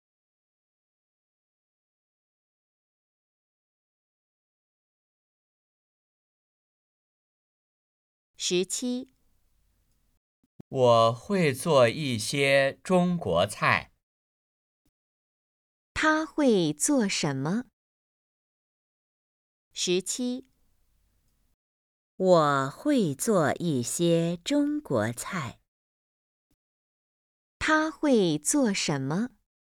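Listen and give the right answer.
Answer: 中国菜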